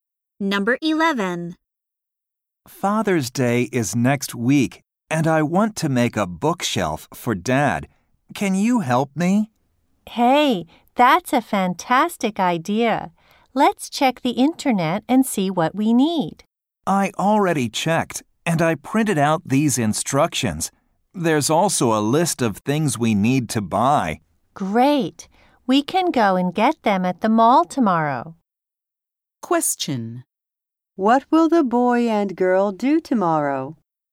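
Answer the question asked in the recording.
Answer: Go to the mall to buy things for a bookshelf.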